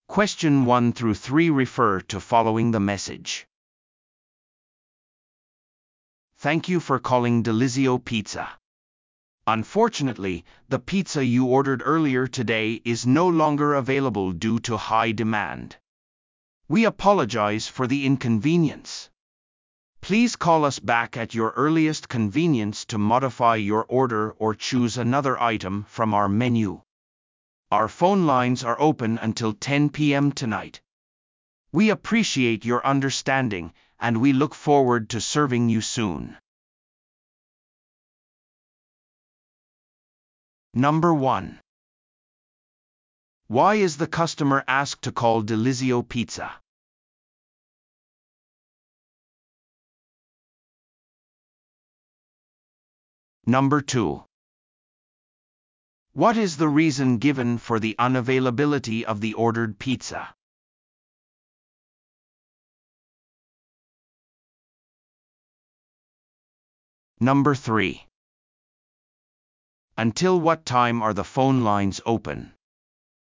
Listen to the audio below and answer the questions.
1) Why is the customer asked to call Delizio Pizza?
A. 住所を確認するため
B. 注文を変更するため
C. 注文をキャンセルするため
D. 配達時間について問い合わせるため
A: B. 注文を変更するため

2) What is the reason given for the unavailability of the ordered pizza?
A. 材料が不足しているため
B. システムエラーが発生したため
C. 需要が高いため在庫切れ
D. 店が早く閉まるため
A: C. 需要が高いため在庫切れ

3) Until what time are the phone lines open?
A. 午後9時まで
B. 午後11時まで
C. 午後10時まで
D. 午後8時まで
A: C. 午後10時まで

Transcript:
"Thank you for calling Delizio Pizza. Unfortunately, the pizza you ordered earlier today is no longer available due to high demand. We apologize for the inconvenience. Please call us back at your earliest convenience to modify your order or choose another item from our menu. Our phone lines are open until 10:00 PM tonight. We appreciate your understanding, and we look forward to serving you soon."

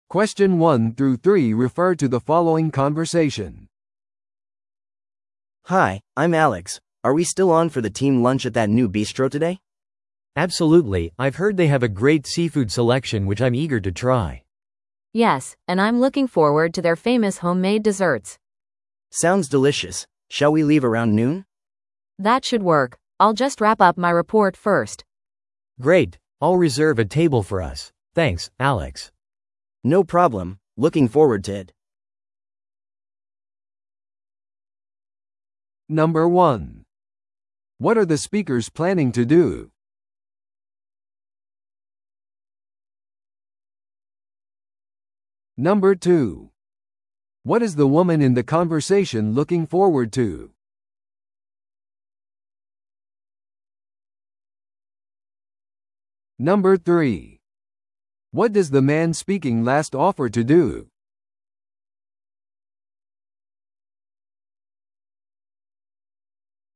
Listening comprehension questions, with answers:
Listen to the audio below and answer the questions.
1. What are the speakers planning to do?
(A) レポートをレビューする。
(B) 新しいシーフードレストランを試す。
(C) チームミーティングを開く。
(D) デザートメニューを計画する。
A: (B) 新しいシーフードレストランを試す。

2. What is the woman in the conversation looking forward to?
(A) 彼女のプレゼンテーションを終える。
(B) ビストロでのシーフード。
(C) ビストロでの手作りデザート。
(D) 予約を取ること。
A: (C) ビストロでの手作りデザート。

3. What does the man speaking last offer to do?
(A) 早めにオフィスを出る。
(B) 女性のためにレポートを仕上げる。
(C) ランチの予約をする。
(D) シーフード料理を準備する。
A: (C) ランチの予約をする。

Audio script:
A: Hi, I'm Alex. Are we still on for the team lunch at that new bistro today?
B: Absolutely, I've heard they have a great seafood selection which I'm eager to try.
C: Yes, and I'm looking forward to their famous homemade desserts.
A: Sounds delicious. Shall we leave around noon?
C: That should work. I'll just wrap up my report first.
B: Great! I'll reserve a table for us. Thanks, Alex.
A: No problem! Looking forward to it.

